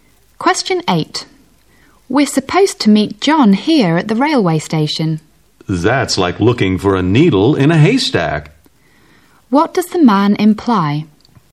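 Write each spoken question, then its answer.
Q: What does the man imply?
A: It will be very hard to find John at the station.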